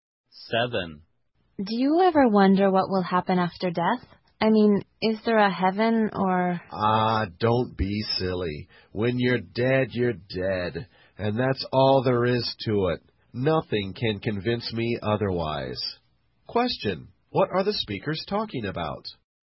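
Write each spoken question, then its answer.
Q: What are the speakers talking about?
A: What happens after death.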